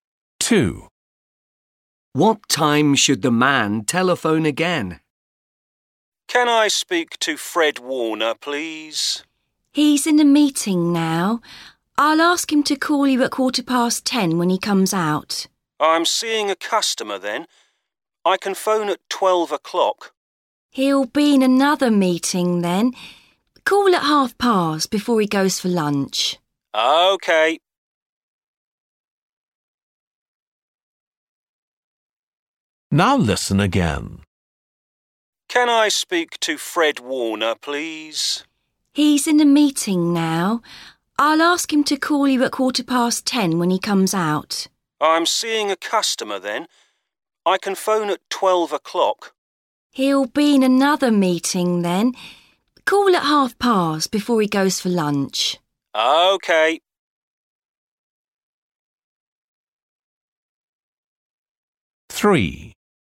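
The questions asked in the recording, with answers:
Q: What time should the man telephone again?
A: 10:30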